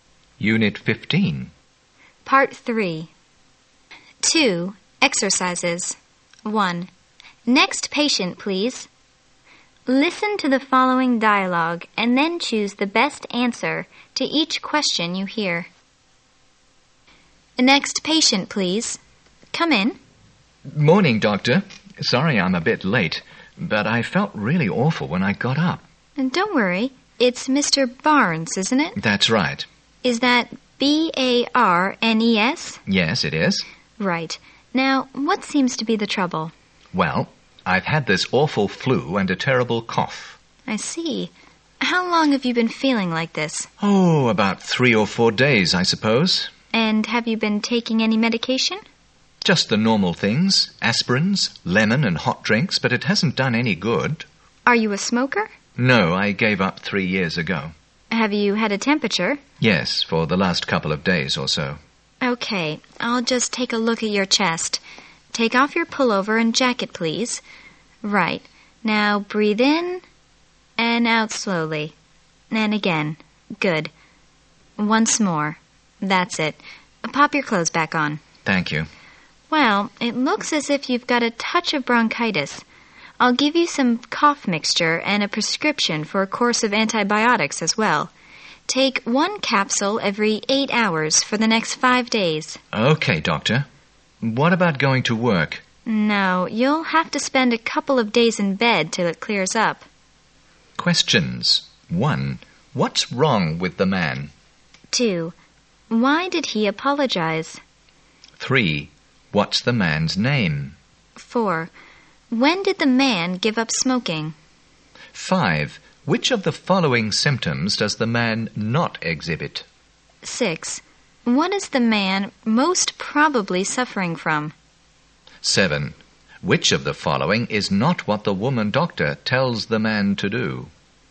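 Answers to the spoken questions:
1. He has flu and a terrible cough.
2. Because he was a bit late.
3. Mr. Barnes
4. Three years ago.
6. Bronchitis.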